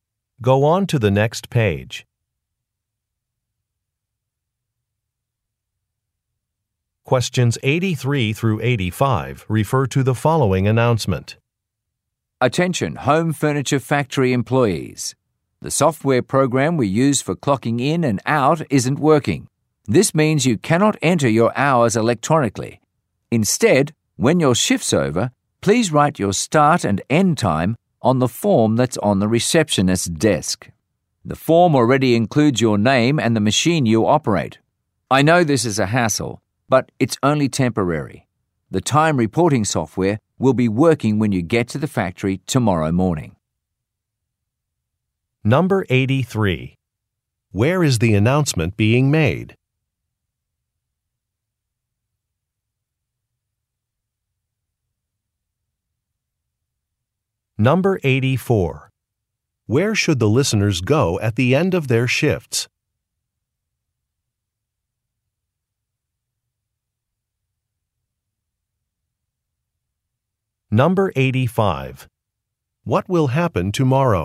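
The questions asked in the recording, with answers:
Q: Where is the announcement being made?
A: At a furniture factory

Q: Where should the listeners go at the end of their shifts?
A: To the receptionist's desk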